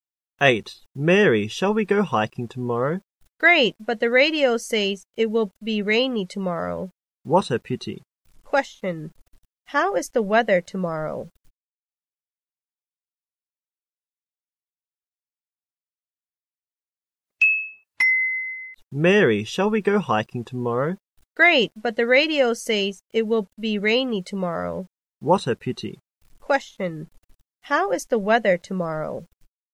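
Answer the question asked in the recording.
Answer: Rainy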